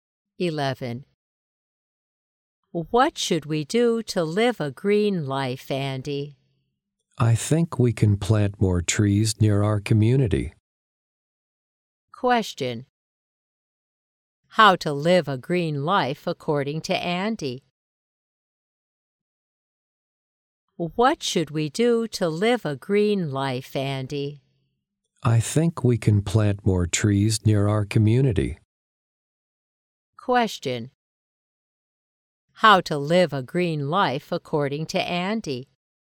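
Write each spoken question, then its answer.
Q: Question: How to live a green life according to Andy?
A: Plant more trees near their community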